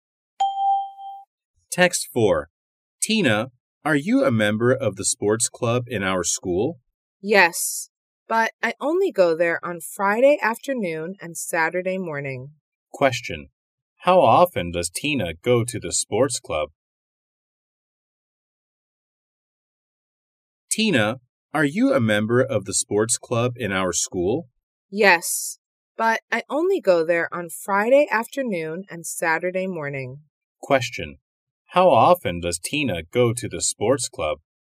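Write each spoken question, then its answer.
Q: How often does Tina go to the sports club?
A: Twice a week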